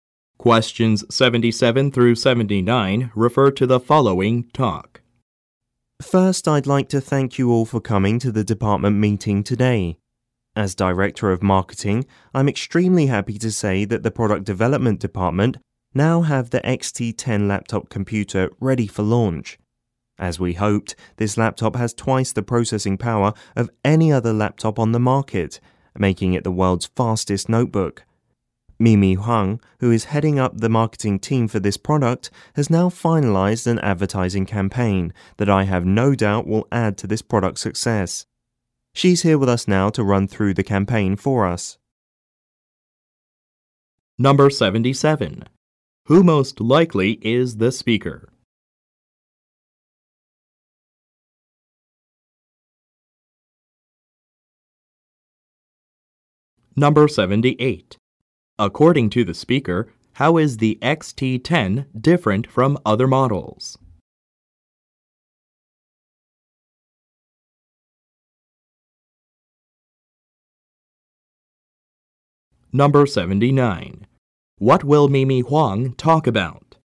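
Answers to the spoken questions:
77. The Director of Marketing
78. It has twice the processing power; it is the world's fastest notebook
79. The advertising campaign for the XT10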